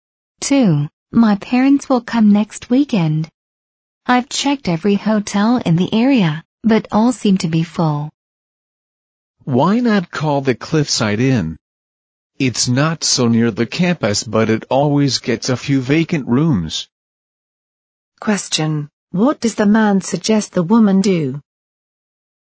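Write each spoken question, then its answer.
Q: What does the man suggest the woman do?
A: Call the Cliffside Inn.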